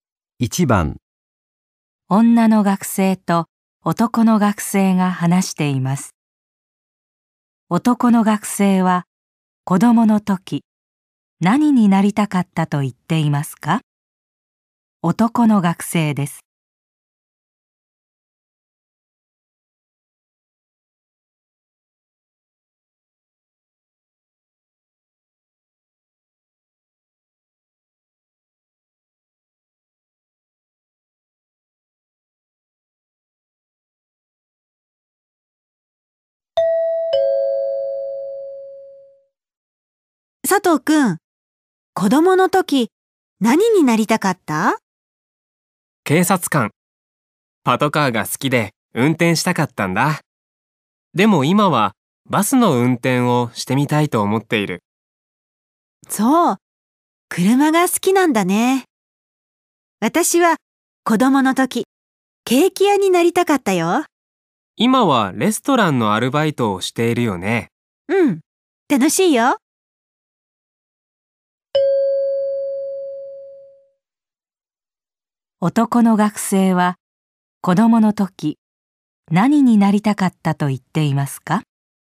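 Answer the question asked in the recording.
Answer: 警察官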